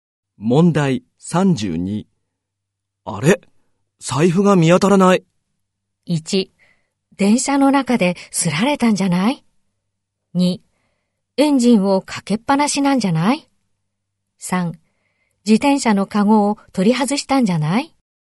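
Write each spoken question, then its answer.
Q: あれ?財布が見当たらない。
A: 1: 電車の中ですられたんじゃない ?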